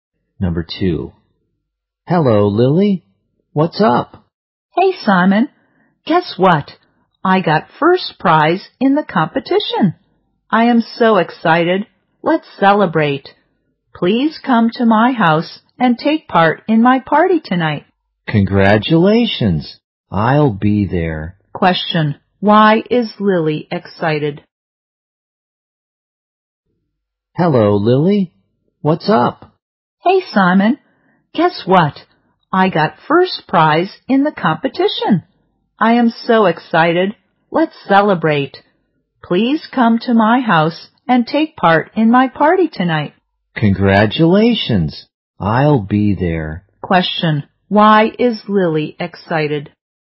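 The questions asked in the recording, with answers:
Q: Why is Lily excited?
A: She got first prize in the competition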